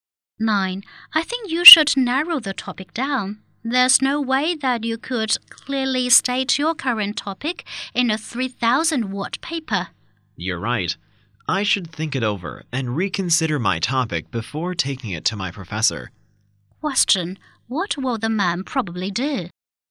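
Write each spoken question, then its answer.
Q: What will the man probably do?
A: Reconsider and narrow down his topic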